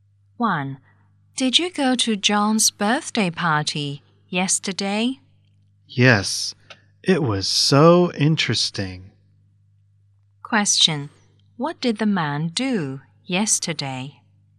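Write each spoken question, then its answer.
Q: What did the man do yesterday?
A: He went to John's birthday party.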